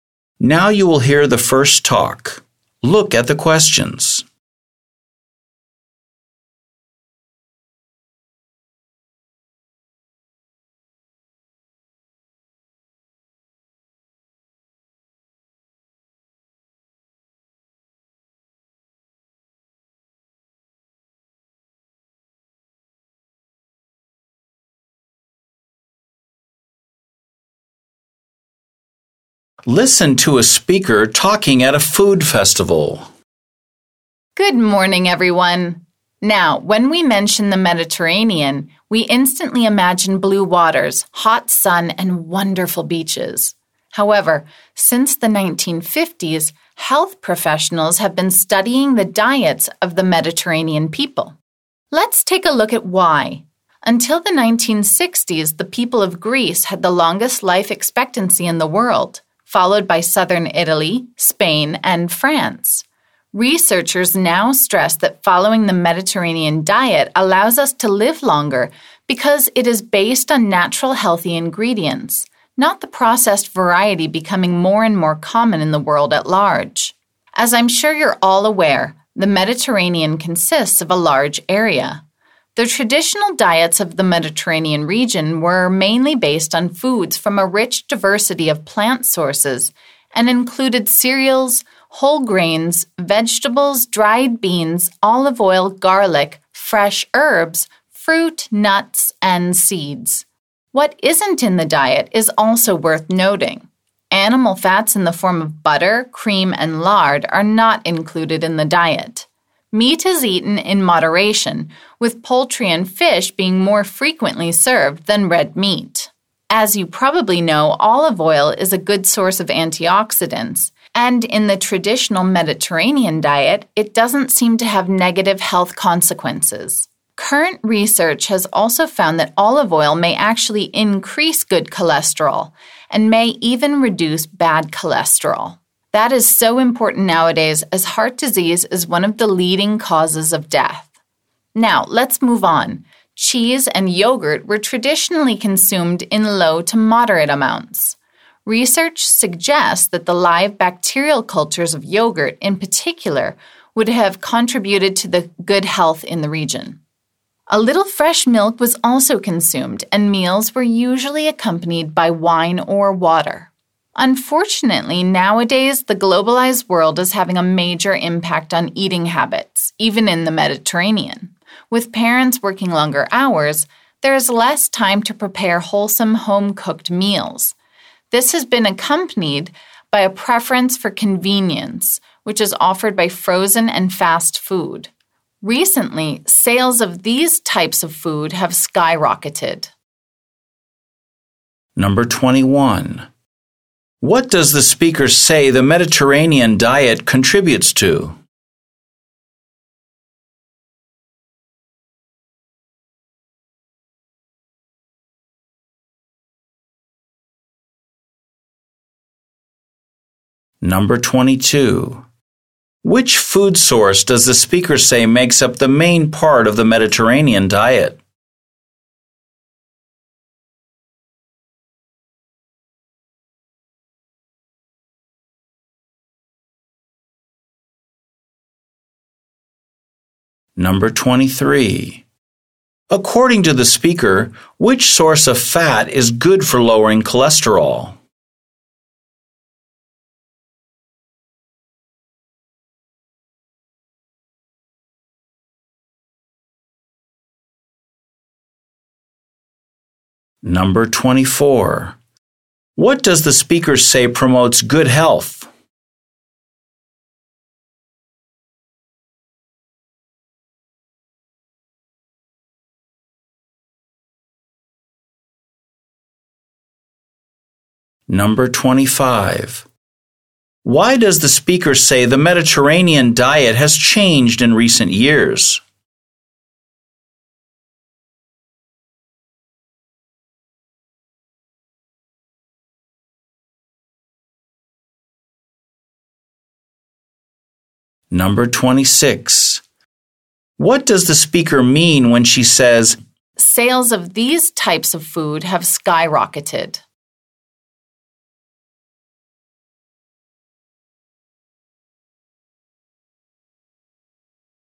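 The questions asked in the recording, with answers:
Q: What does the speaker say the Mediterranean diet contributes to?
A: Living longer (long life expectancy)

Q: Which food source does the speaker say makes up the main part of the Mediterranean diet?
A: Plant sources

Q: According to the speaker, which source of fat is good for lowering cholesterol?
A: Olive oil

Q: What does the speaker say promotes good health?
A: The live bacterial cultures in yogurt

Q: Why does the speaker say the Mediterranean diet has changed in recent years?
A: Parents work longer hours and prefer convenient frozen and fast food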